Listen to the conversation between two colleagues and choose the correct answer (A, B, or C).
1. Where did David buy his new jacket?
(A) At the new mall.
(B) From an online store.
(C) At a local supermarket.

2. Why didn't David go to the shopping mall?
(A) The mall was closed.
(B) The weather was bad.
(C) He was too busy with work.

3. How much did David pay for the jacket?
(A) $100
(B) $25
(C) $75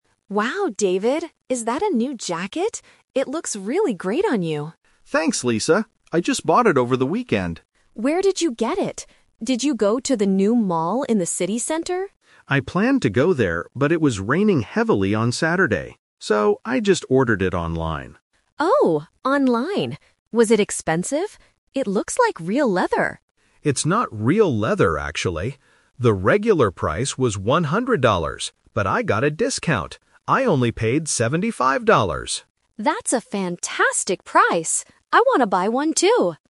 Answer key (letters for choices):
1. B
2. B
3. C

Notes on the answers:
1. David says, "I just ordered it online." Option (A) is the trap (bẫy); Lisa asks if he went to the new mall, and David planned to, but he changed his mind. Option (C) is not mentioned in the audio.
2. David explains that he didn't go to the mall because "it was raining heavily." Options (A) and (C) are plausible reasons for not going shopping, but they are not mentioned in the conversation.
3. This question uses a number trap. David explicitly says, "I only paid seventy-five dollars." Option (A) is the trap; $100 is the regular price, not the price he paid. Option (B) is a plausible mathematical distractor (the discount amount: 100 - 75 = 25), but it is not the amount he paid.

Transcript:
Lisa: Wow, David! Is that a new jacket? It looks really great on you.
David: Thanks, Lisa! I just bought it over the weekend.
Lisa: Where did you get it? Did you go to the new mall in the city center?
David: I planned to go there, but it was raining heavily on Saturday. So, I just ordered it online.
Lisa: Oh, online! Was it expensive? It looks like real leather.
David: It's not real leather, actually. The regular price was one hundred dollars, but I got a discount.